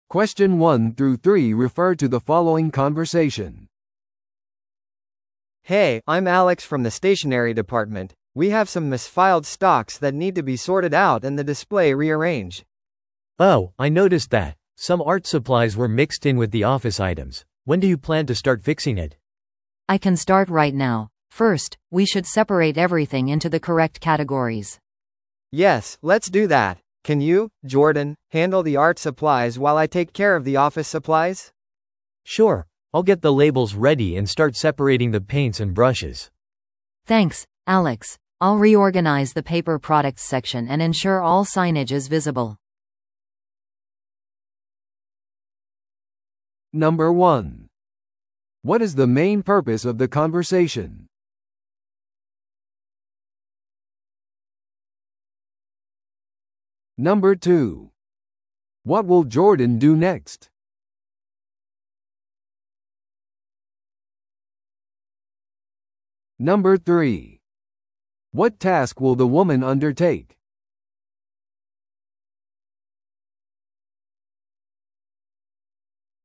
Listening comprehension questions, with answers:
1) What is the main purpose of the conversation?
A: 在庫分類の誤りを修正する。

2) What will Jordan do next?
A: アート用品セクションのラベル付けと整理をする。

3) What task will the woman undertake?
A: 紙製品セクションの再編成をする。

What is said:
A: Hey, I'm Alex from the stationery department. We have some misfiled stocks that need to be sorted out and the display rearranged.
B: Oh, I noticed that. Some art supplies were mixed in with the office items. When do you plan to start fixing it?
C: I can start right now. First, we should separate everything into the correct categories.
A: Yes, let's do that. Can you, Jordan, handle the art supplies while I take care of the office supplies?
B: Sure, I'll get the labels ready and start separating the paints and brushes.
C: Thanks, Alex. I'll reorganize the paper products section and ensure all signage is visible.